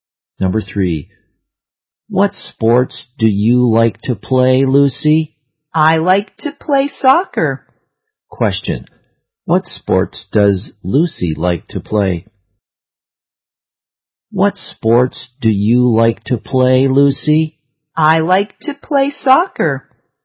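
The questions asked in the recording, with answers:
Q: Question, what sports does Lucy like to play?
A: Soccer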